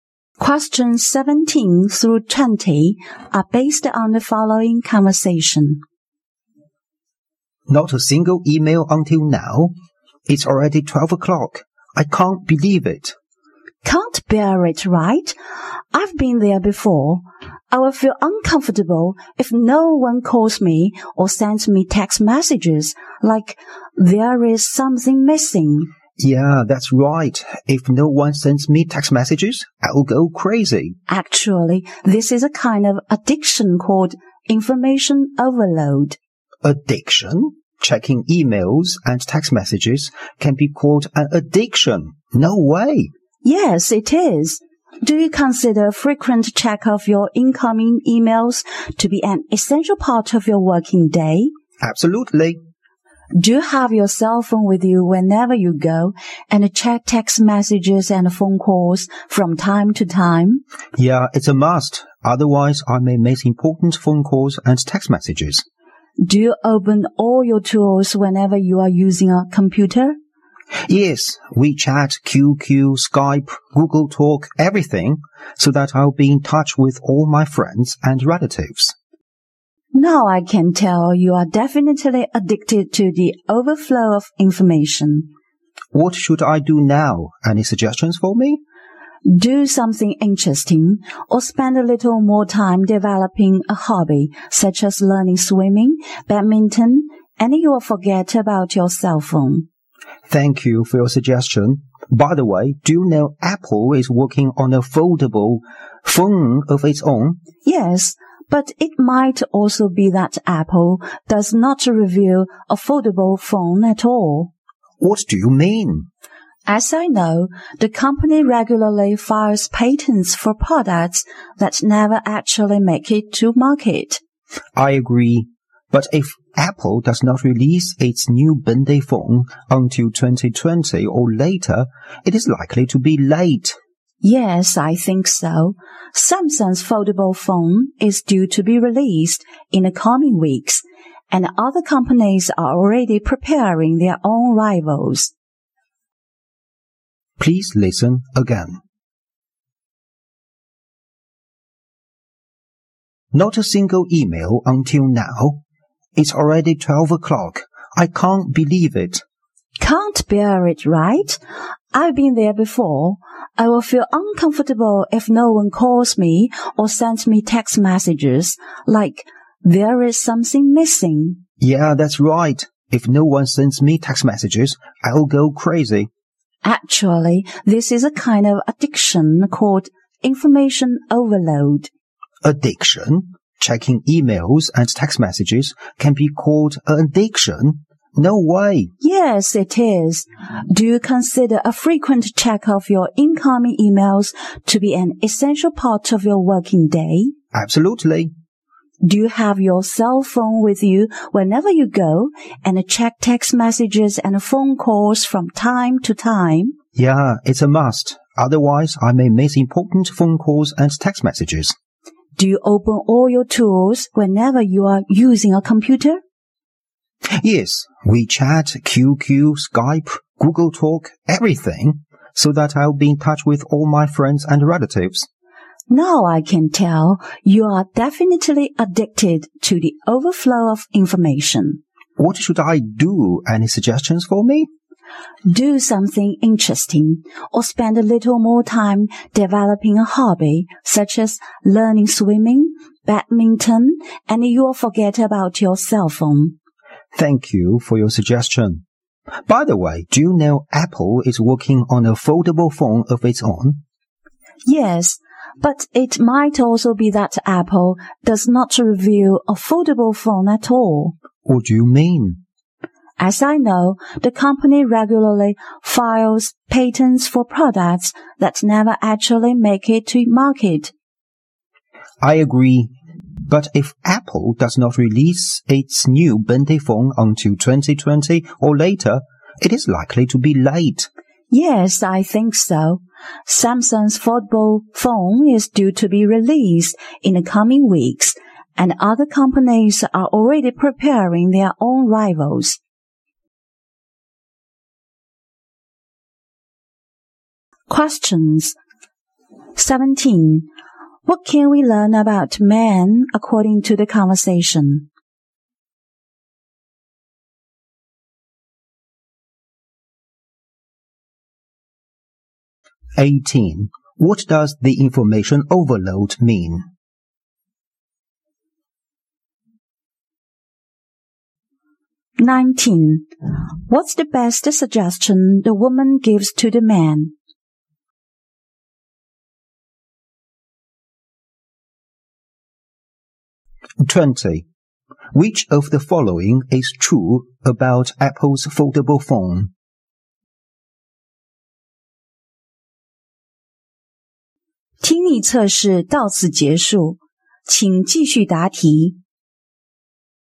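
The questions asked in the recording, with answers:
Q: What does the information overload mean?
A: An addiction to checking emails and text messages

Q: What's the best suggestion the woman gives to the man?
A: Develop a hobby such as swimming or badminton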